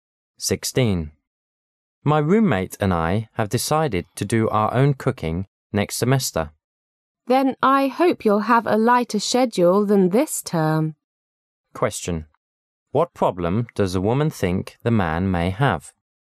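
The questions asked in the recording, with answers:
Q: What problem does a woman think the man may have?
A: He may not have enough time to cook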